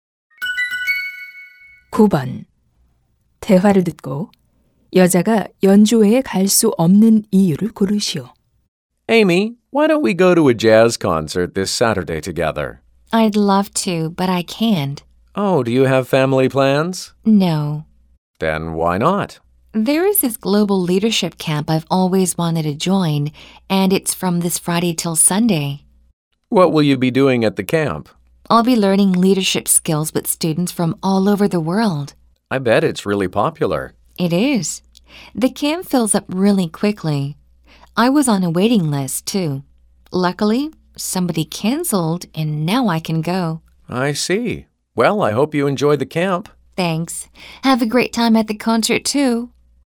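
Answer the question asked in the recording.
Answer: 글로벌 리더십 캠프에 참가해야 해서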